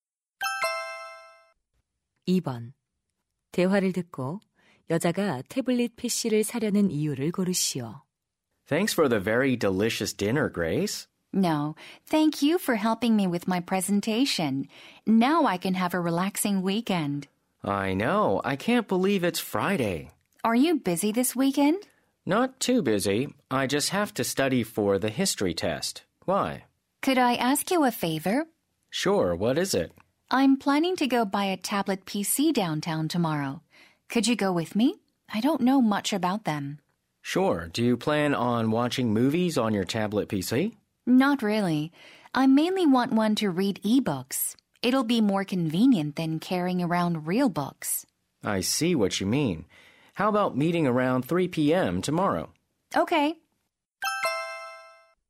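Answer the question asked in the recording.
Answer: 전자책을 읽기 위해서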